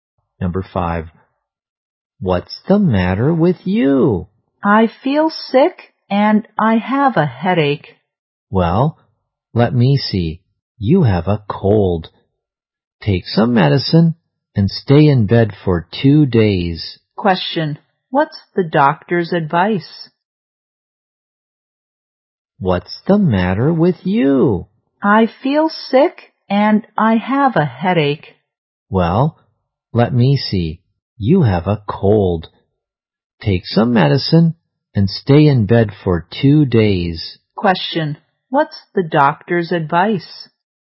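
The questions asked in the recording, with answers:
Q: Question, what's the doctor's advice?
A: Take some medicine and stay in bed for 2 days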